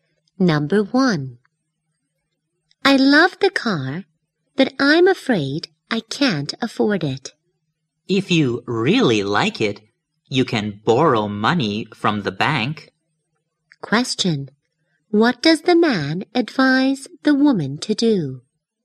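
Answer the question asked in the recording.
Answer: Borrow money from the bank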